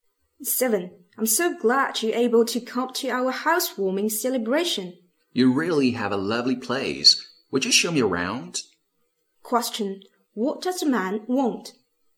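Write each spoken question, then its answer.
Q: What does the man want?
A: A tour of the new house.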